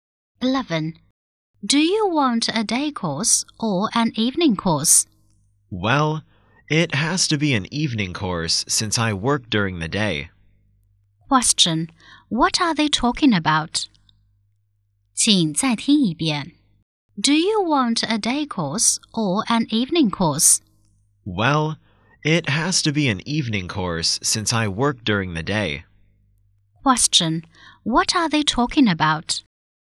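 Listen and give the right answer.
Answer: Choosing a course (an evening course).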